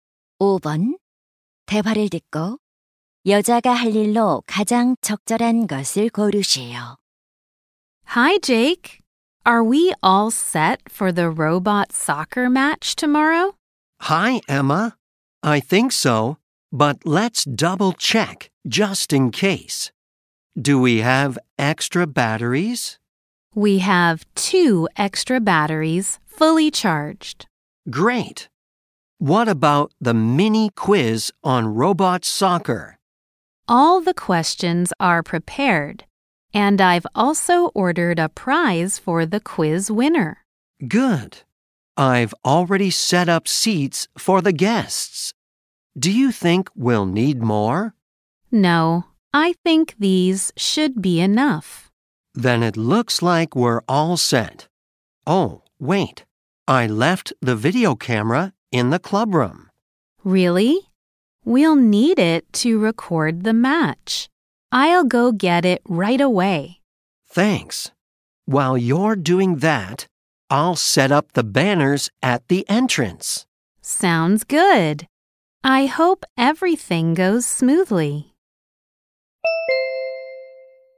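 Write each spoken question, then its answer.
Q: 대화를 듣고 여자가 할 일로 가장 적절한 것을 고르시오.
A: 입구에 현수막 설치하기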